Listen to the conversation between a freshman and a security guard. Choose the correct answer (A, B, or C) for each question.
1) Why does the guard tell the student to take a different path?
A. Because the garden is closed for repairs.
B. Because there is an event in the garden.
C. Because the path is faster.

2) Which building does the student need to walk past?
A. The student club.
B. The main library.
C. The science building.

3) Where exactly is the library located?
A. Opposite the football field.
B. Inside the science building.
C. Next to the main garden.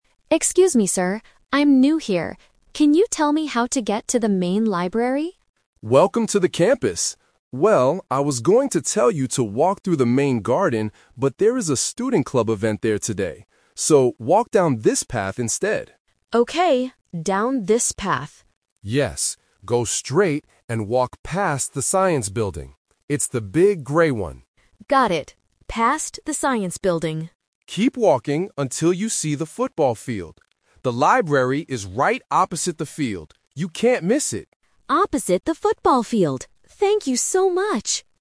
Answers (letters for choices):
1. B
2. C
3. A

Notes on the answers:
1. The Key: The guard explains the "twist" clearly: "there is a student club event there today." The Trap: Option (A) is a plausible guess (repairs/construction is a common reason to change paths), but it is not mentioned in the audio.
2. The Key: The guard instructs the student to "go straight and walk past the science building." The Trap: Option (A) uses the keyword "student club", but that is the event in the garden, not a building to walk past. Option (B) is the final destination.
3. The Key: The guard gives the exact location: "The library is right opposite the field." The Trap: Option (B) uses a landmark from the journey to confuse the listener. Option (C) mentions the garden, which is the area the student was told to avoid.

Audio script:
Freshman: Excuse me, sir. I'm new here. Can you tell me how to get to the main library?
Security Guard: Welcome to the campus! Well, I was going to tell you to walk through the main garden, but there is a student club event there today. So, walk down this path instead.
Freshman: Okay, down this path.
Security Guard: Yes. Go straight and walk past the science building. It's the big grey one.
Freshman: Got it. Past the science building.
Security Guard: Keep walking until you see the football field. The library is right opposite the field. You can't miss it.